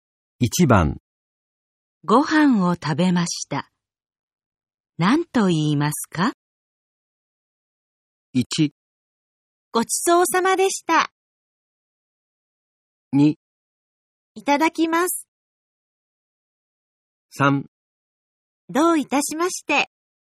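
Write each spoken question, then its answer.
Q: ご飯を食べました。何と言いますか?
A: 1: ごちそうさまでした。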